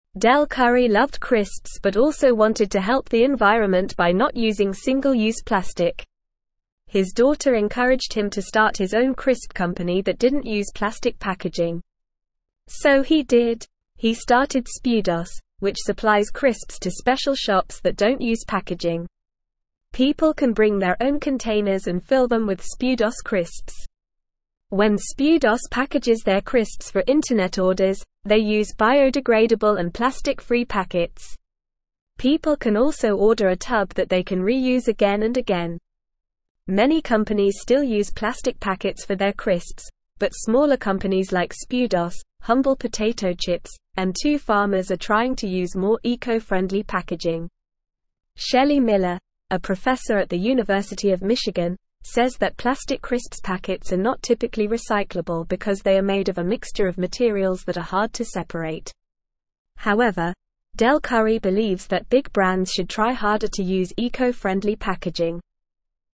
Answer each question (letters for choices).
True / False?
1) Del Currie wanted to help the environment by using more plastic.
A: False

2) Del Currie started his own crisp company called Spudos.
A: True

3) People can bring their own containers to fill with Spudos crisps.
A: True

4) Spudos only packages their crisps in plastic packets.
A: False

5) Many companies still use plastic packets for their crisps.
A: True

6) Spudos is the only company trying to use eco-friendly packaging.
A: False

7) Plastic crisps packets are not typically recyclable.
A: True

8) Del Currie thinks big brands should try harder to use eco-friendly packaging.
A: True

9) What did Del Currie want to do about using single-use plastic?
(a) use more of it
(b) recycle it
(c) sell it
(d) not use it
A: d

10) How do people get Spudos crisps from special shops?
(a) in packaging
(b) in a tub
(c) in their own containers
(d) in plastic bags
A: c

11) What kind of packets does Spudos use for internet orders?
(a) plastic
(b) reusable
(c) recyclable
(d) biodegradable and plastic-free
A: d

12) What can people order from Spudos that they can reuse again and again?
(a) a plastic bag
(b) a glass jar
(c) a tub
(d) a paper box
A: c

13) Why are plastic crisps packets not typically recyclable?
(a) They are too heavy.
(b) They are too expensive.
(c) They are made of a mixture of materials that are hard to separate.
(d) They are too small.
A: c

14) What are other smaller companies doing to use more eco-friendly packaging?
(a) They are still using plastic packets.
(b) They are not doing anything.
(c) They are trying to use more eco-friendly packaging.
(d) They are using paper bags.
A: c

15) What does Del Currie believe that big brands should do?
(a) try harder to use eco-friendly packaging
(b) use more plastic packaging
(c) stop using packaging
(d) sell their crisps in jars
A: a

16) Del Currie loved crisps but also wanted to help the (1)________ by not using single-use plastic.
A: environment

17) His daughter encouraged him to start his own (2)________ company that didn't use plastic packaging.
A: crisp

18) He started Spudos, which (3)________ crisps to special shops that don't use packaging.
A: supplies

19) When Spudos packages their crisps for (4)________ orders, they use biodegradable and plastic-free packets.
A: internet

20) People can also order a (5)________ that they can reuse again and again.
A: tub

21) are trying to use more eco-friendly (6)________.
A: packaging

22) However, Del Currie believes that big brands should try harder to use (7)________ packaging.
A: eco-friendly

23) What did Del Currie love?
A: Del Currie loved crisps.

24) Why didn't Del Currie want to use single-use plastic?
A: Del Currie wanted to help the environment and single-use plastic can be harmful to the environment.

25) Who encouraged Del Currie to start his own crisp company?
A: Del Currie's daughter encouraged him to start his own crisp company.

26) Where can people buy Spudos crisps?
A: People can buy Spudos crisps at special shops that don't use packaging.

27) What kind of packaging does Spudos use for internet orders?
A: Spudos uses biodegradable and plastic-free packets for internet orders.

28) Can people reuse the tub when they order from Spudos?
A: Yes, people can reuse the tub when they order from Spudos.

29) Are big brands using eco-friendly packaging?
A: No, big brands are not using eco-friendly packaging very much, but some smaller companies are trying to use more eco-friendly packaging.

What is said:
Del Currie loved crisps but also wanted to help the environment by not using single-use plastic. His daughter encouraged him to start his own crisp company that didn't use plastic packaging. So he did! He started Spudos, which supplies crisps to special shops that don't use packaging. People can bring their own containers and fill them with Spudos crisps. When Spudos packages their crisps for internet orders, they use biodegradable and plastic-free packets. People can also order a tub that they can reuse again and again.
Many companies still use plastic packets for their crisps, but smaller companies like Spudos, Humble Potato Chips, and Two Farmers are trying to use more eco-friendly packaging. Shelie Miller, a professor at the University of Michigan, says that plastic crisps packets are not typically recyclable because they are made of a mixture of materials that are hard to separate. However, Del Currie believes that big brands should try harder to use eco-friendly packaging.

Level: Level 1